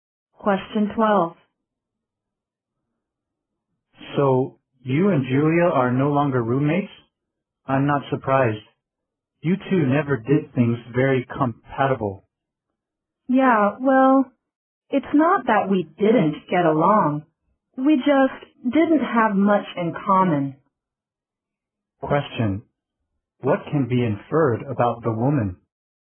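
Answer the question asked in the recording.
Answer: She and Julia got along but had little in common, so they no longer room together.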